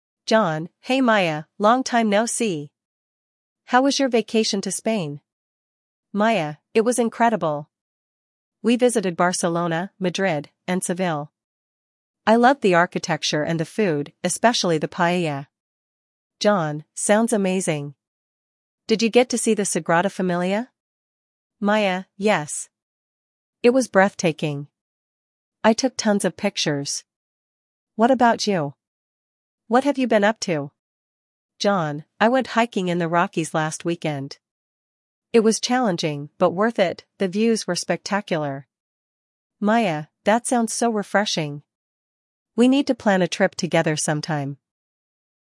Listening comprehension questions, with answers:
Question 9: Where did Maya go on vacation?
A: Spain

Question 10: What did Maya enjoy the most?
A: Architecture and food

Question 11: What famous landmark does John mention?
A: Sagrada Familia

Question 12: Where did John go recently?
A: Hiking in the Rockies

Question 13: What do John and Maya discuss at the end?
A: Planning a trip together

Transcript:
John: Hey Maya, long time no see! How was your vacation to Spain?
Maya: It was incredible! We visited Barcelona, Madrid, and Seville. I loved the architecture and the food—especially the paella.
John: Sounds amazing. Did you get to see the Sagrada Familia?
Maya: Yes! It was breathtaking. I took tons of pictures. What about you? What have you been up to?
John: I went hiking in the Rockies last weekend. It was challenging but worth it—the views were spectacular.
Maya: That sounds so refreshing! We need to plan a trip together sometime.